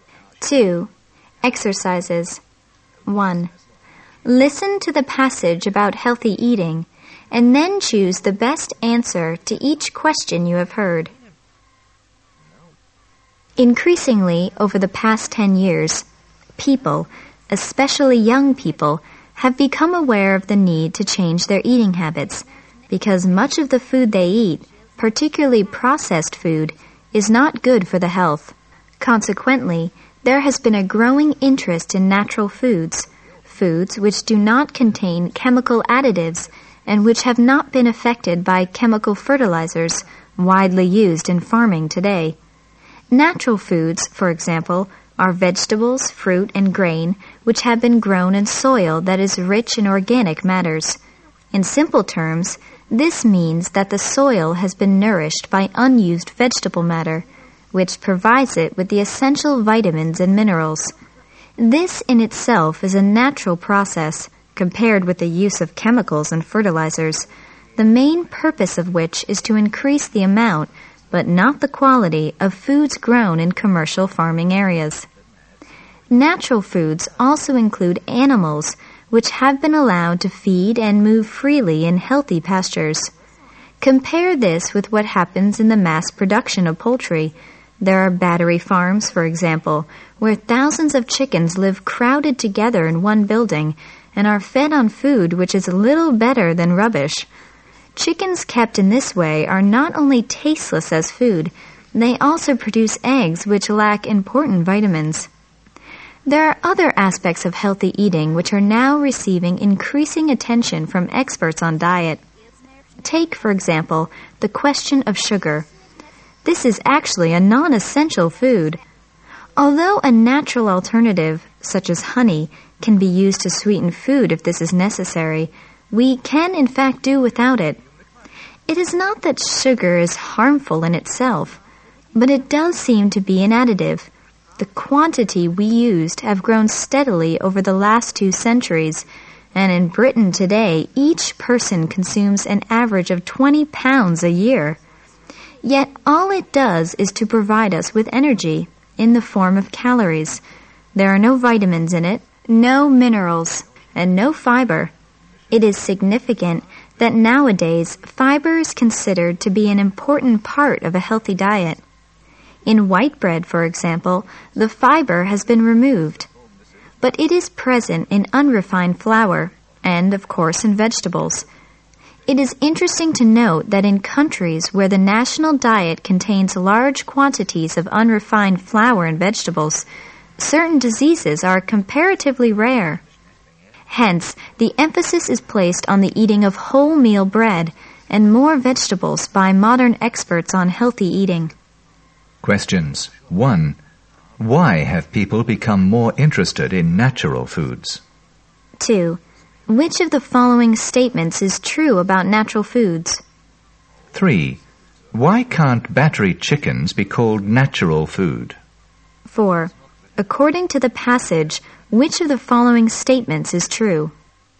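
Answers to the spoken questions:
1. Because much of the food they eat, especially processed food, is not good for their health
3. They live crowded together, are fed on food little better than rubbish, and their eggs lack important vitamins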